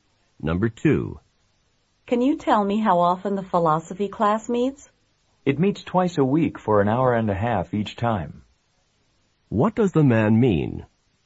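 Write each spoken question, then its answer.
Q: What does the man mean?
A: The philosophy class meets for three hours a week, twice a week for 90 minutes each time.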